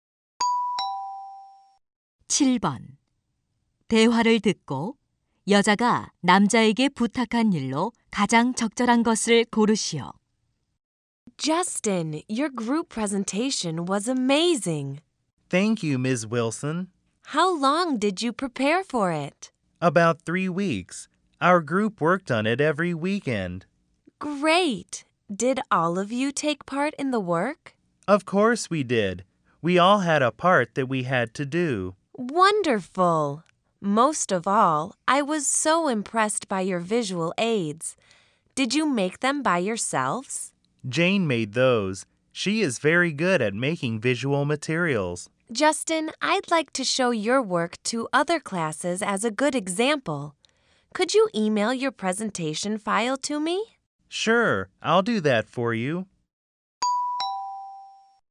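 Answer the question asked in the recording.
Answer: 발표 파일을 이메일로 보내기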